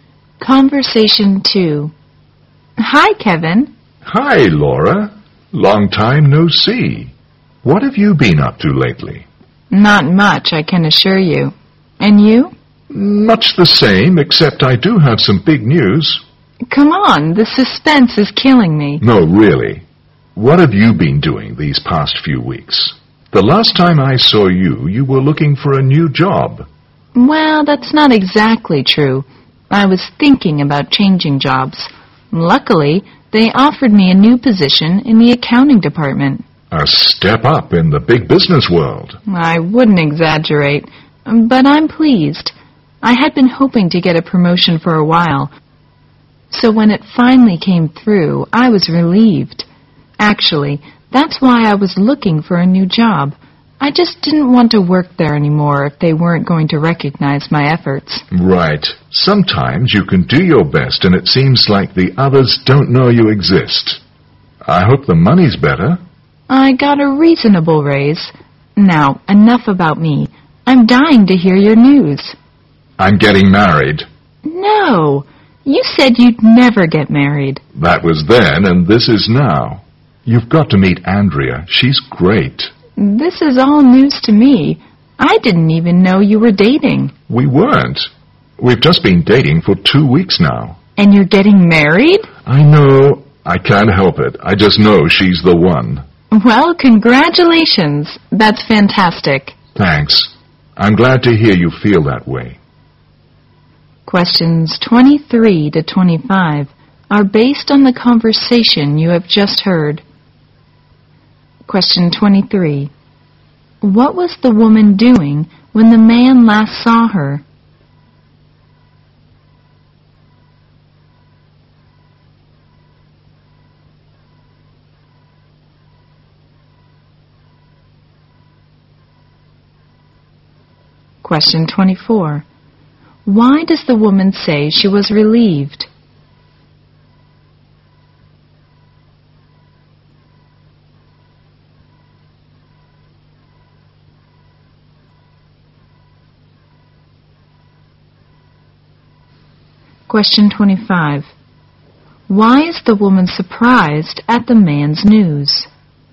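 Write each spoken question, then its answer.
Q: What was the woman doing when the man last saw her?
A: Looking for a new job (thinking about changing jobs)

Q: Why does the woman say she was relieved?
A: She finally got a promotion

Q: Why is the woman surprised at the man's news?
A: He said he'd never marry and she didn't know he was dating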